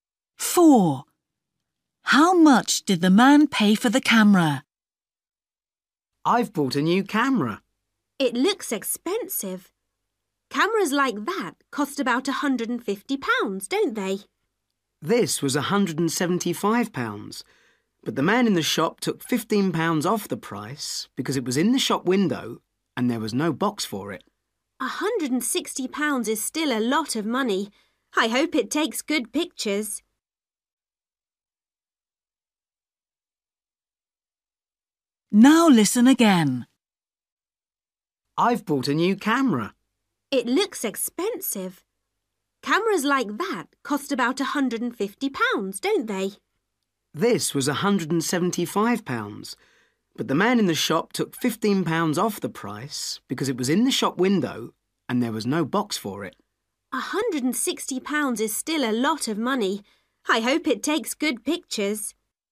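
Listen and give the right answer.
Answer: £160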